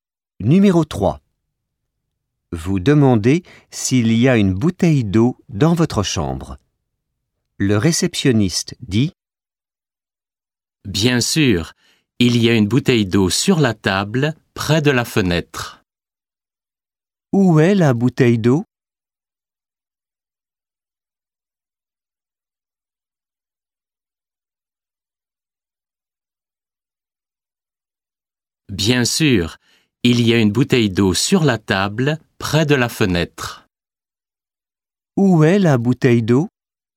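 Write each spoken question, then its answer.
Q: Où est la bouteille d'eau?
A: Sur la table, près de la fenêtre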